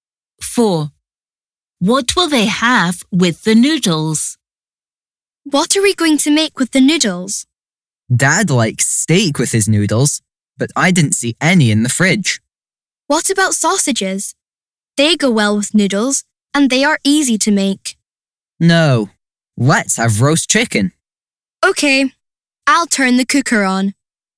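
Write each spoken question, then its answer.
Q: What will they have with the noodles?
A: Roast chicken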